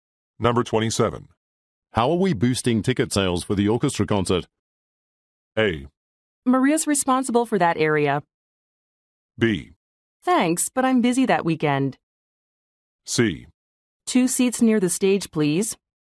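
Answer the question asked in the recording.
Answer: A: Maria's responsible for that area.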